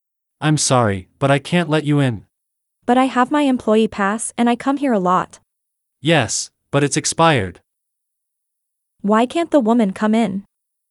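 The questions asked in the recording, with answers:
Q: Why can't the woman come in?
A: Her employee pass has expired.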